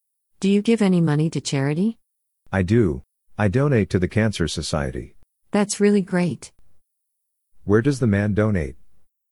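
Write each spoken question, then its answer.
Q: Where does the man donate?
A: The Cancer Society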